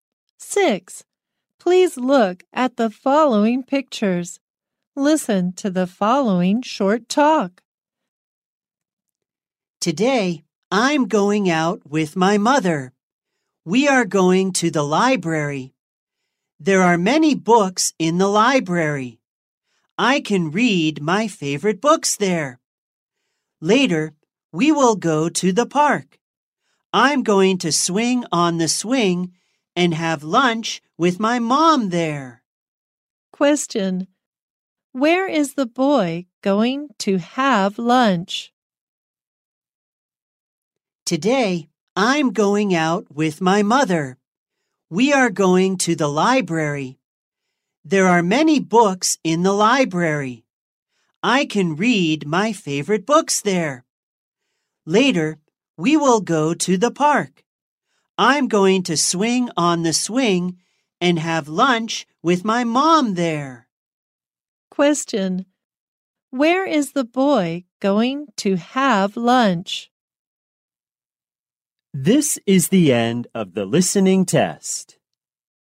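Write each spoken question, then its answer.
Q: Where is the boy going to have lunch?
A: In the park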